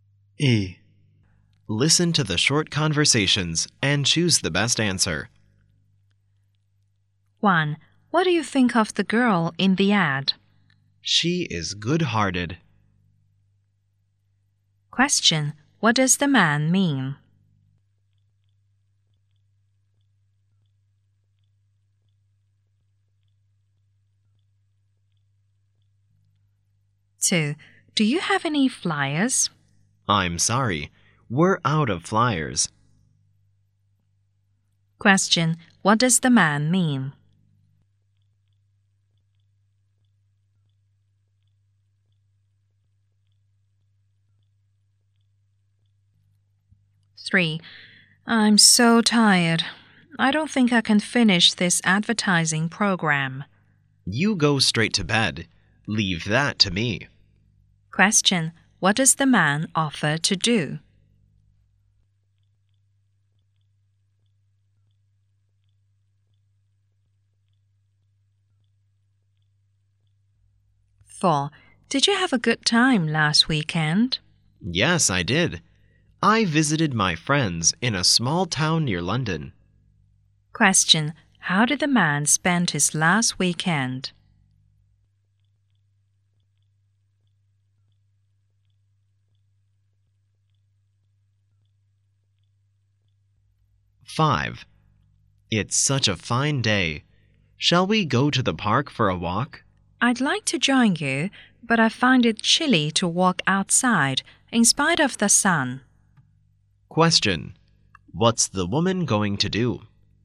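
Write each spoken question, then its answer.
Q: What does the man mean?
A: He thinks the girl in the ad is good-hearted.

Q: What does the man mean?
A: They have no flyers left.

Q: What does the man offer to do?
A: Finish the advertising program for her.

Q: How did the man spend his last weekend?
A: He visited his friends in a small town near London.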